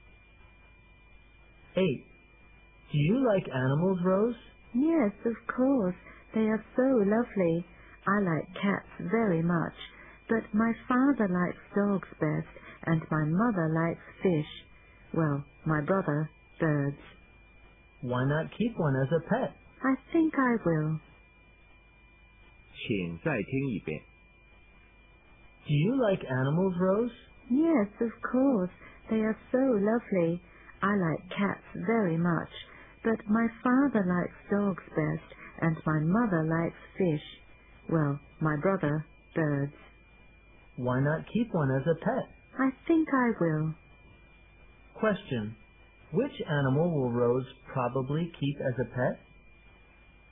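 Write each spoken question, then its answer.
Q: Question.Which animal will Rose probably keep as a pet?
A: A cat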